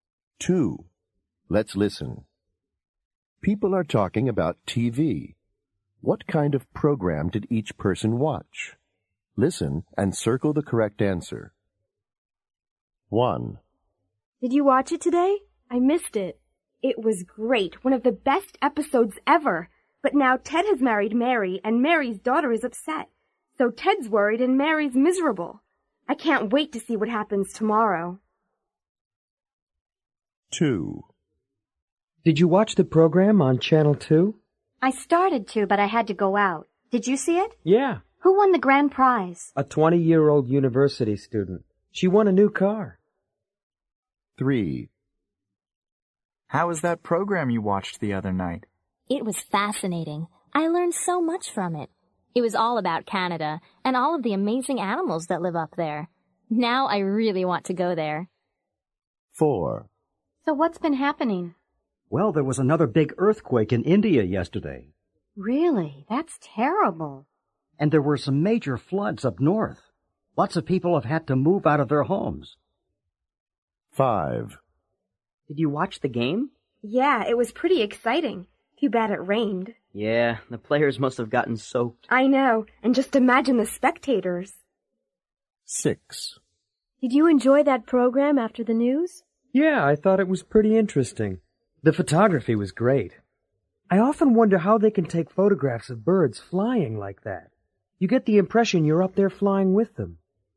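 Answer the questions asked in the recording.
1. a soap opera
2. a game show
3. a documentary about Canada's animals
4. the news
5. a sports game
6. a nature program about birds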